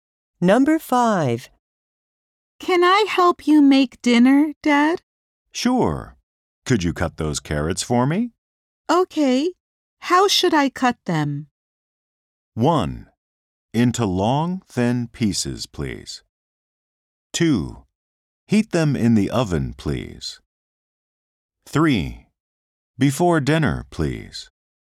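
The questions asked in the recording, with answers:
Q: Okay. How should I cut them?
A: 1: Into long, thin pieces, please.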